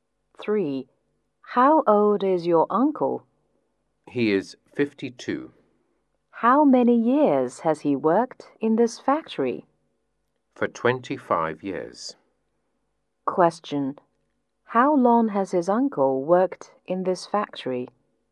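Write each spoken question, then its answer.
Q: How long has his uncle worked in this factory?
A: For 25 years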